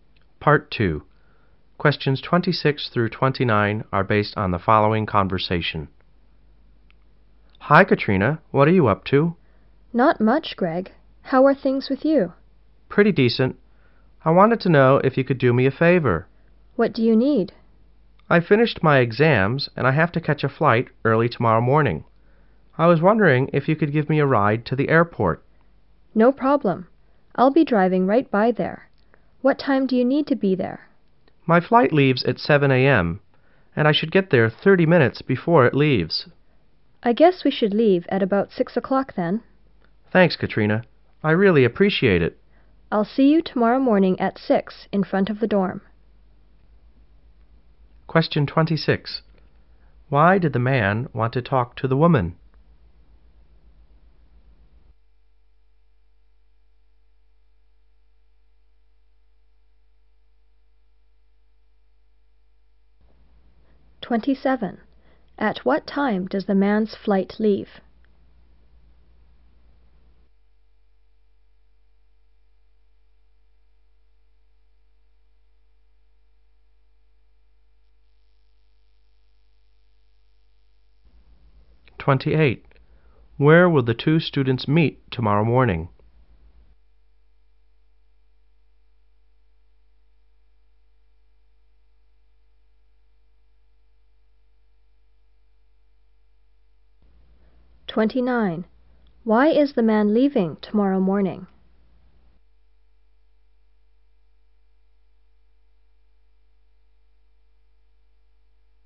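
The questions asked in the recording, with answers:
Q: Why did the man want to talk to the woman?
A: To ask her for a ride to the airport

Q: At what time does the man's flight leave?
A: 7 a.m.

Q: Where will the two students meet tomorrow morning?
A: In front of the dorm

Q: Why is the man leaving tomorrow morning?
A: He finished his exams and has a flight to catch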